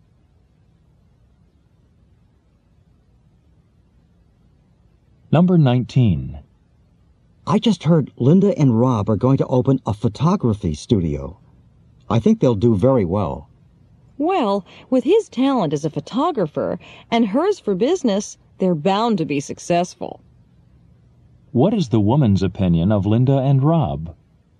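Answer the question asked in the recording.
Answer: Their skills complement each other, so they'll succeed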